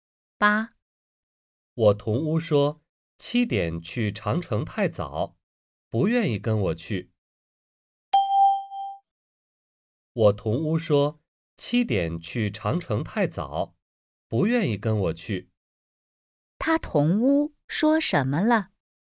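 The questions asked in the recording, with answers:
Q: 他同屋说什么了?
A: 七点去长城太早,不愿意去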